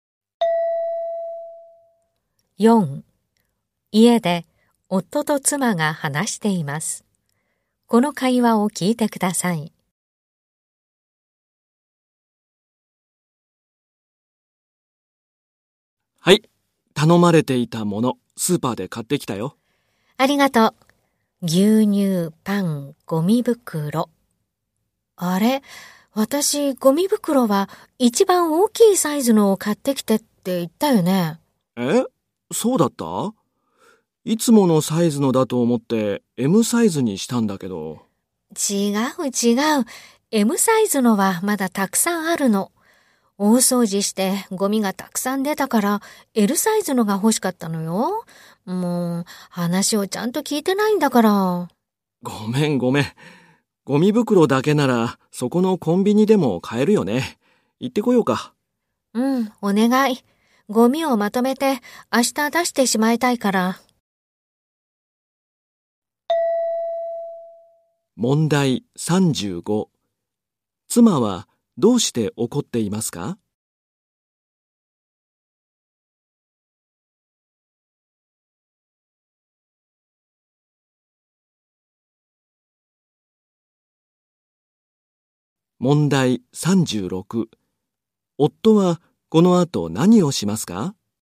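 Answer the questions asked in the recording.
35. 夫がLサイズではなくMサイズのゴミ袋を買ってきたから
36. コンビニへLサイズのゴミ袋を買いに行く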